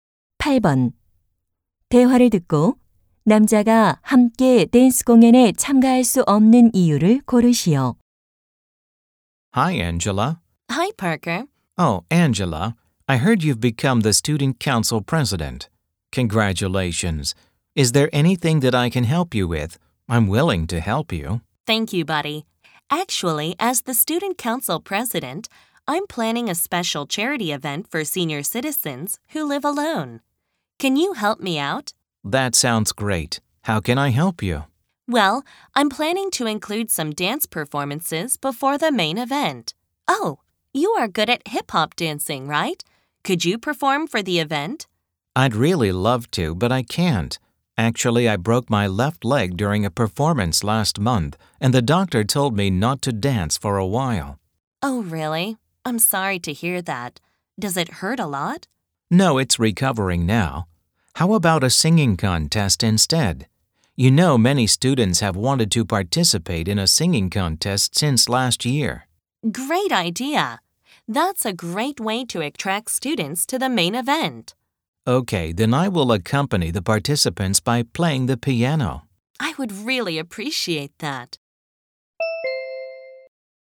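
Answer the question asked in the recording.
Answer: 왼쪽 다리가 부러져서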